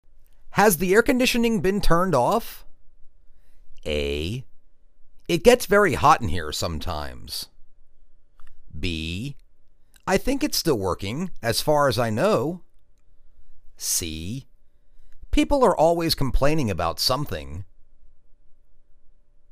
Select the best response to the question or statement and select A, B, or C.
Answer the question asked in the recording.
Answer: I think it's still working, as far as I know.